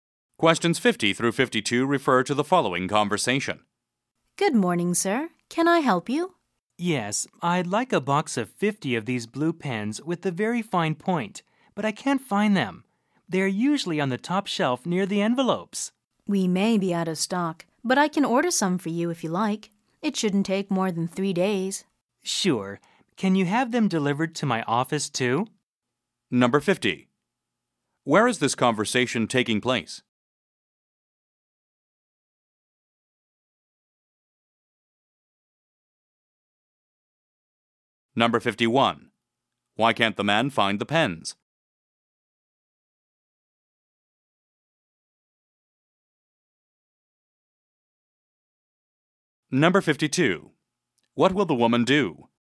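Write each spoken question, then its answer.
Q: Why can't the man find the pens?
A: They may be out of stock

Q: What will the woman do?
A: Order the pens for him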